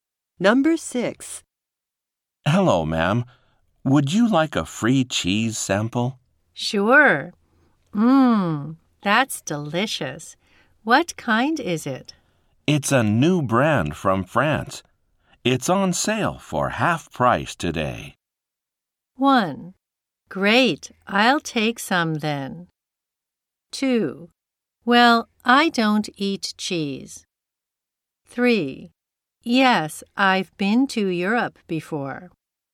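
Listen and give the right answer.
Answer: 1: Great, I'll take some then.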